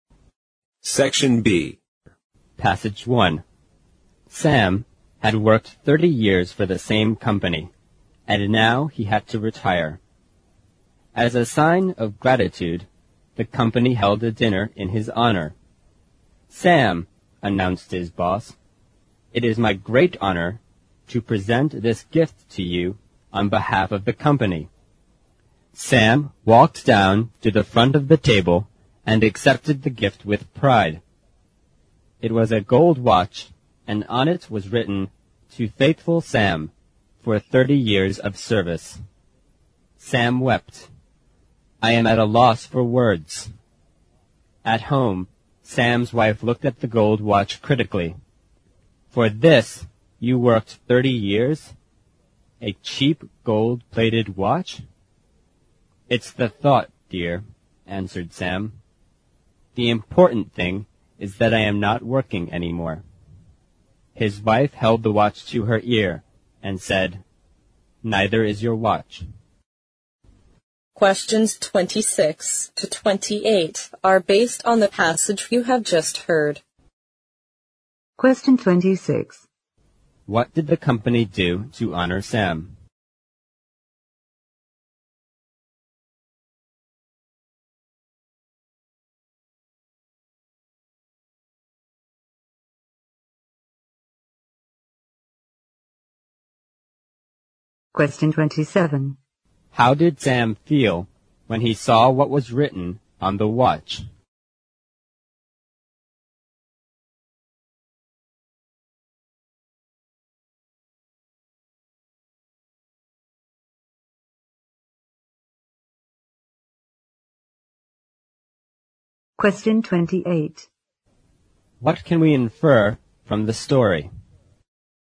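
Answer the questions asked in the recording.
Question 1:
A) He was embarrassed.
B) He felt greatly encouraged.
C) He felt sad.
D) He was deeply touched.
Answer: D) He was deeply touched.
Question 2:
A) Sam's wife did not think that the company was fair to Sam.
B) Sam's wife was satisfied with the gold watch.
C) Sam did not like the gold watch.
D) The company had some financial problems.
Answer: A) Sam's wife did not think that the company was fair to Sam.
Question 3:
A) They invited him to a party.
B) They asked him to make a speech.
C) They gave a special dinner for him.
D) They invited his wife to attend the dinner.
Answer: C) They gave a special dinner for him.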